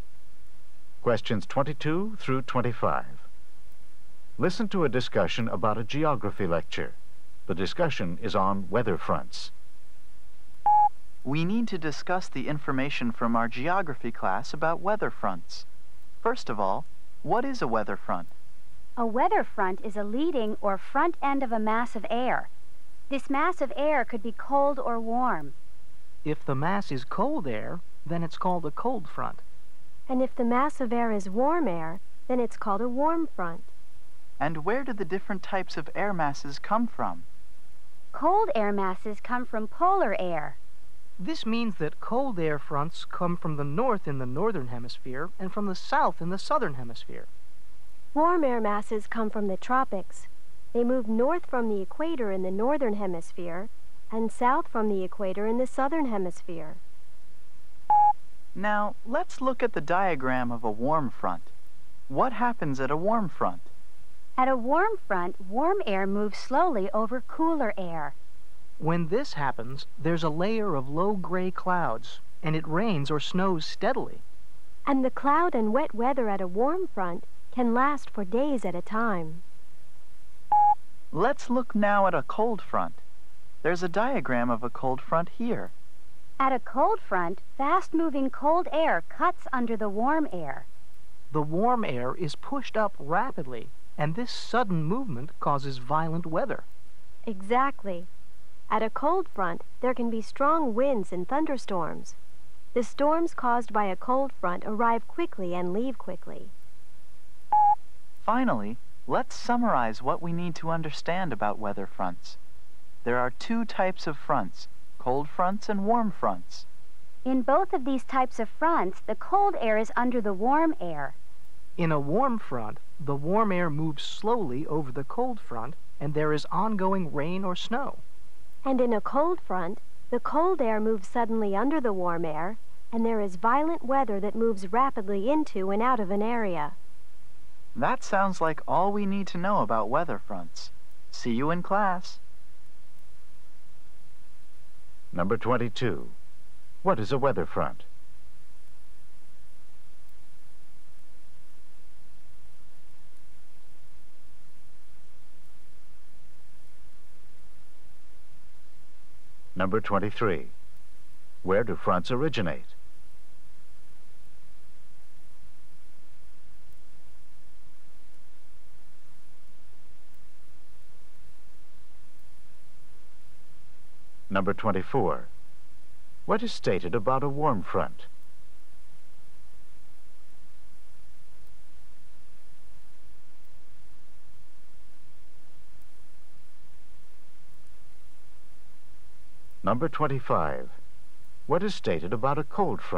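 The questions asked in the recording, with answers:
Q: What is a weather front?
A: The leading or front end of a mass of air

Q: Where do fronts originate?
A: Cold fronts in polar regions, warm fronts in the tropics

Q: What is stated about a warm front?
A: Warm air moves slowly over cooler air, bringing steady rain or snow that can last for days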